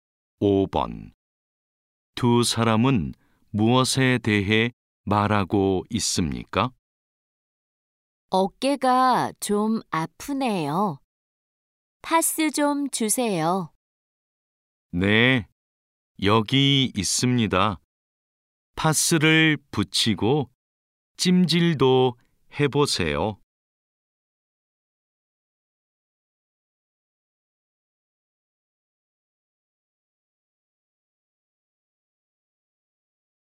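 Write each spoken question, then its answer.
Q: 두 사람은 무엇에 대해 말하고 있습니까?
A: 어깨가 아파서 사는 파스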